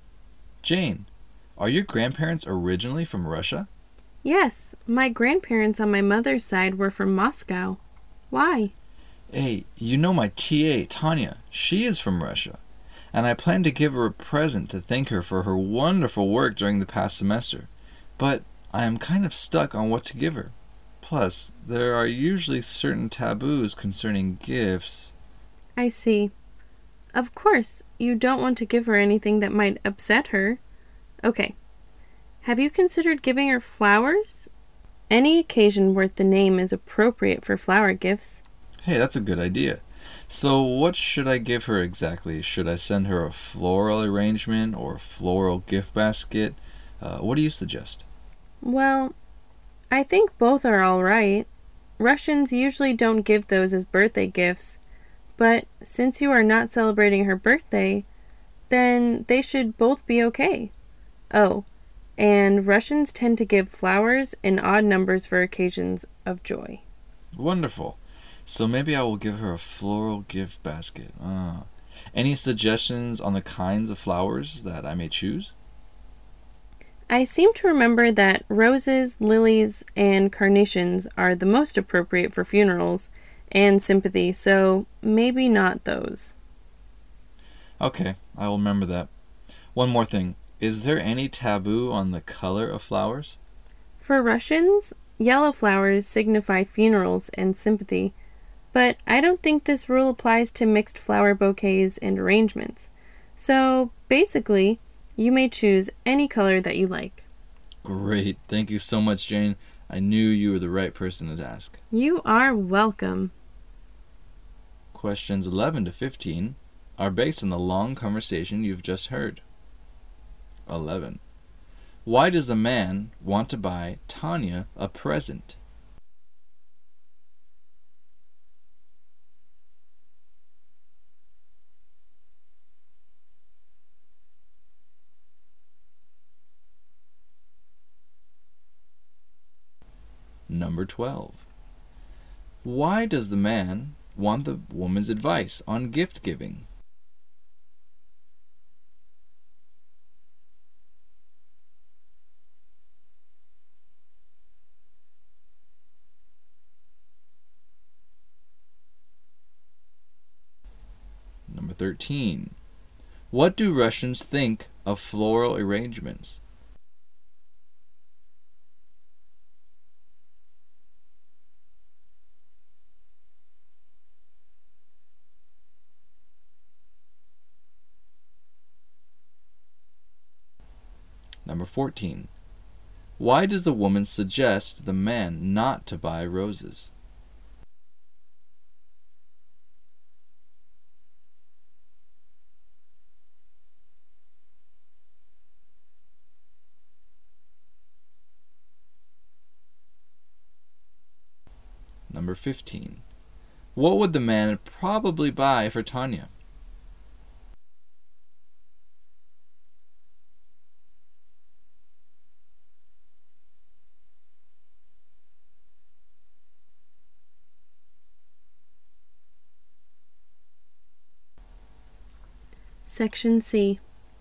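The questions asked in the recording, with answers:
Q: Why does the man want to buy Tanya a present?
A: To thank her for her wonderful work during the past semester

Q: Why does the man want the woman's advice on gift giving?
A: Her grandparents were from Russia and he wants to avoid gift taboos

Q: Why does the woman suggest the man not to buy roses?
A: Roses are for funerals and sympathy

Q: What would the man probably buy for Tanya?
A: A floral gift basket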